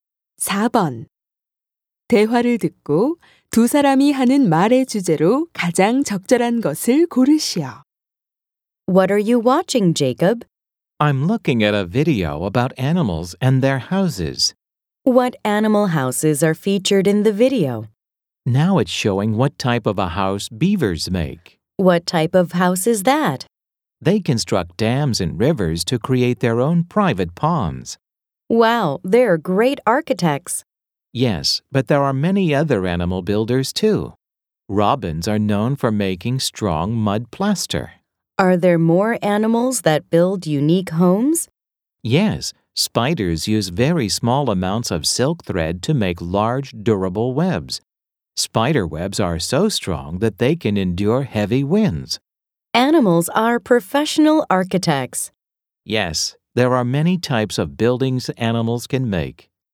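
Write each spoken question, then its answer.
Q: 대화를 듣고 두 사람이 하는 말의 주제로 가장 적절한 것을 고르시오.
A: 동물들이 짓는 다양한 집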